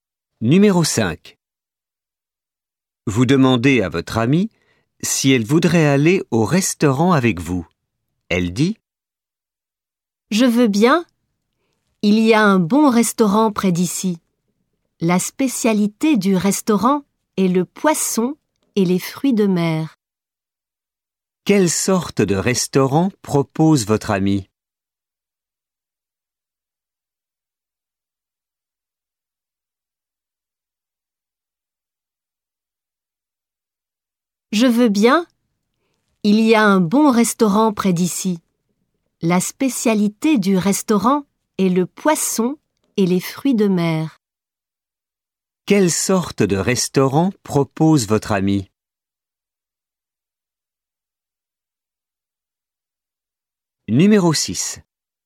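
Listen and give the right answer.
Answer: Un restaurant de poisson et fruits de mer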